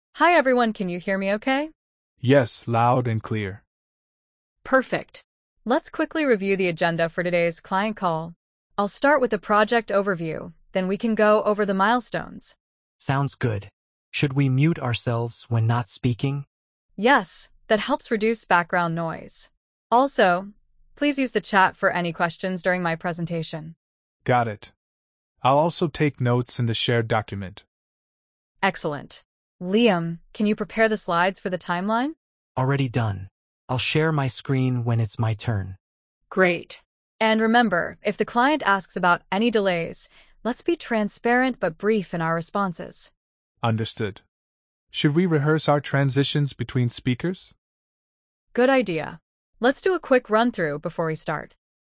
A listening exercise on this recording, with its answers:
Complete the phrases as you listen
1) Hi everyone, can you hear me ______?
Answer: okay

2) Yes, loud and ______.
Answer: clear

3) Let's quickly review the ______ for today's client call.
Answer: agenda

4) Should we mute ourselves when not ______?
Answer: speaking

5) That helps reduce ______ noise.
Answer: background

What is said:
Maya: Hi everyone, can you hear me okay?
Raj: Yes, loud and clear.
Maya: Perfect. Let's quickly review the agenda for today's client call. I'll start with the project overview, then we can go over the milestones.
Liam: Sounds good. Should we mute ourselves when not speaking?
Maya: Yes, that helps reduce background noise. Also, please use the chat for any questions during my presentation.
Raj: Got it. I'll also take notes in the shared document.
Maya: Excellent. Liam, can you prepare the slides for the timeline?
Liam: Already done. I'll share my screen when it's my turn.
Maya: Great. And remember, if the client asks about any delays, let's be transparent but brief in our responses.
Raj: Understood. Should we rehearse our transitions between speakers?
Maya: Good idea. Let's do a quick run-through before we start.